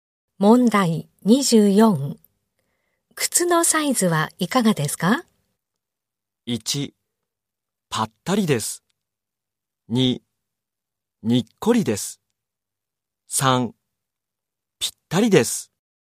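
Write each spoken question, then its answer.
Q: 靴のサイズはいかがですか?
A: 3: ぴったりです。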